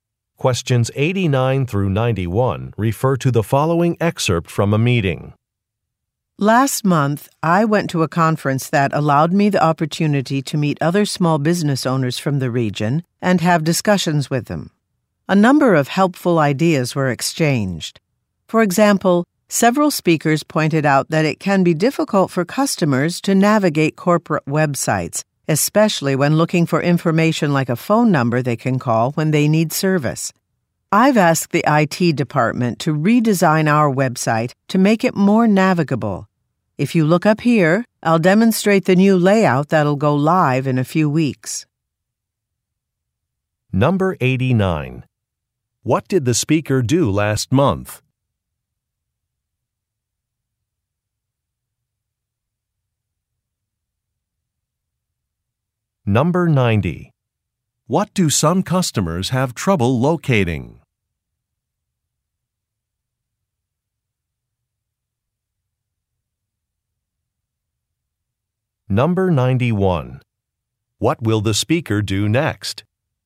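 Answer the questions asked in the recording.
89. Attended a conference for small business owners
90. A phone number for service on corporate websites
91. Demonstrate the new website layout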